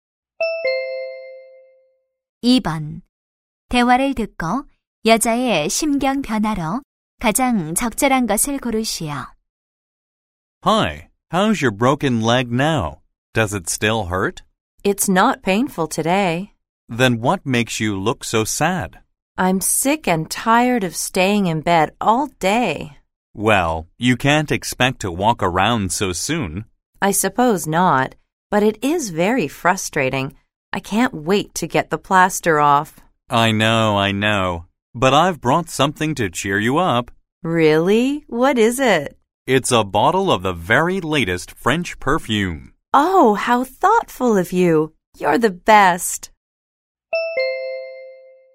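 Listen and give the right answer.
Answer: 답답함에서 기쁨으로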